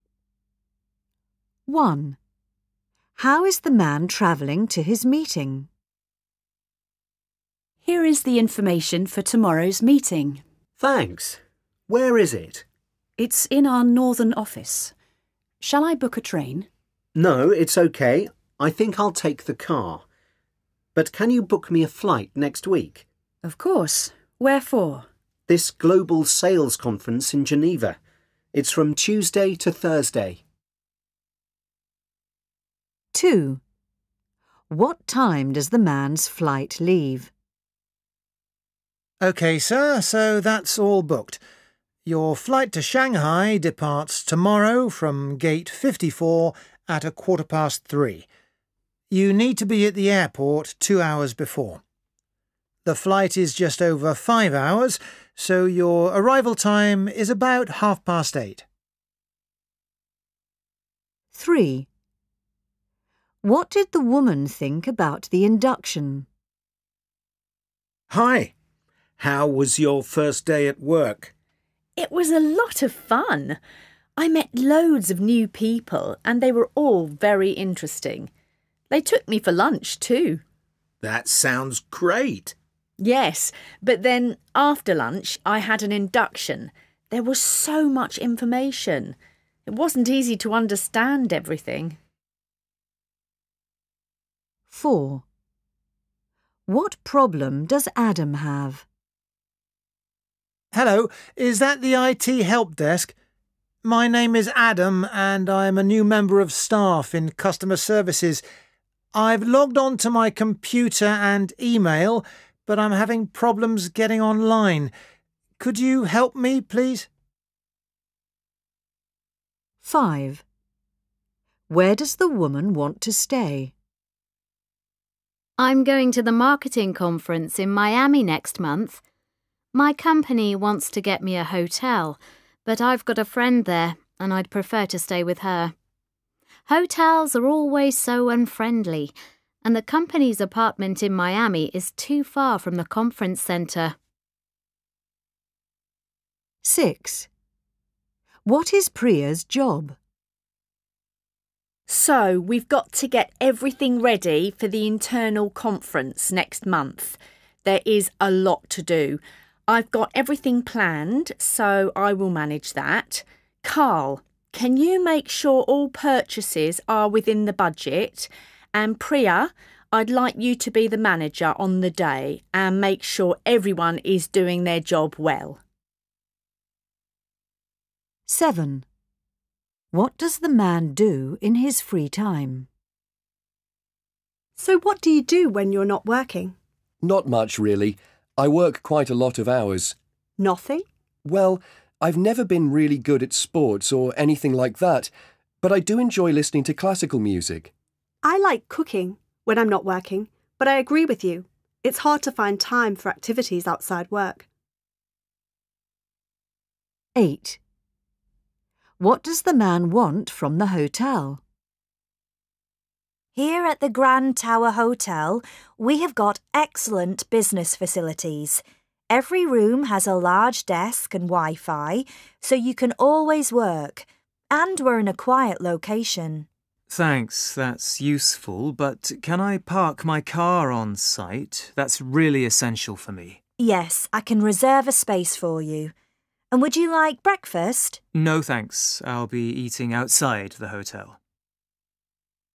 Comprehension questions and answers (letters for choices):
2. You will hear eight short recordings twice. For questions 1–8 choose the correct answer.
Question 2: What time does the man's flight leave?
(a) 8.30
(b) 3.15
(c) 5.40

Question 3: What did the woman think about the induction?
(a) It was difficult.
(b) It was fun.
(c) It was interesting.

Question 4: What problem does Adam have?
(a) He can't access his email account.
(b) He can't find login details.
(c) He can't connect to the internet.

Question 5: Where does the woman want to stay?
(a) at a friend's house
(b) in a rented apartment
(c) in a business hotel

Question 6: What is Preeya's job?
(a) to plan the event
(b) to organise the budget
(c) to manage the staff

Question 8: What does the man want from the hotel?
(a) a table for work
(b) parking facilities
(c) meals included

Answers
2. b
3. a
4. c
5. a
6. c
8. b

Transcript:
1 How is the man travelling to his meeting?
W: Here is the information for tomorrow's meeting.
M: Thanks. Where is it?
W: It's in our Northern office. Shall I book a train?
M: No, it's OK. I think I'll take the car. But can you book me a flight next week?
W: Of course, where for?
M: This global sales conference in Geneva. It's from Tuesday to Thursday.
2 What time does the man's flight leave?
OK sir, so that's all booked. Your flight to Shanghai departs tomorrow from gate 54 at a quarter past three. You need to be at the airport two hours before. The flight is just over five hours so your arrival time is about half past eight.
3 What did the woman think about the induction?
M: Hi, how was your first day at work?
W: It was a lot of fun. I met loads of new people and they were all very interesting. They took me for lunch, too!
M: That sounds great!
W: Yes, but then, after lunch, I had an induction. There was so much information! It wasn't easy to understand everything!
4 What problem does Adam have?
Hello, is that the IT helpdesk? My name is Adam and I am a new member of staff in customer services. I've logged on to my computer and email, but I'm having problems getting online. Could you help me please?
5 Where does the woman want to stay?
I'm going to the marketing conference in Miami next month. My company wants to get me a hotel, but I've got a friend there and I'd prefer to stay with her. Hotels are always so unfriendly and the company's apartment in Miami is too far from the conference centre.
6 What is Preeya's job?
So we've got to get everything ready for the internal conference next month. There is a lot to do. I've got everything planned so I will manage that. Karl, can you make sure all purchases are within the budget, and Preeya, I'd like you to be the manager on the day and make sure everyone is doing their job well.
7 What does the man do in his free time?
W: So, what do you do when you're not working?
M: Not much really. I work quite a lot of hours.
W: Nothing?
M: Well, I've never been really good at sports or anything like that, but I do enjoy listening to classical music.
W: I like cooking, when I'm not working, but I agree with you, it's hard to find time for activities outside work!
8 What does the man want from the hotel?
A: Here at the Grand Tower Hotel, we have got excellent business facilities, every room has a large desk and wi-fi, so you can always work, and we're in a quiet location.
B: Thanks, that's useful, but can I park my car on site? That's really essential for me.
A: Yes, I can reserve a space for you. And would you like breakfast?
B: No thanks, I'll be eating outside the hotel.
3.